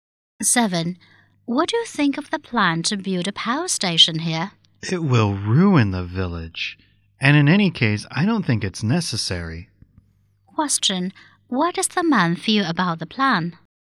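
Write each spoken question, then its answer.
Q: What does the man feel about the plan?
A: He is against it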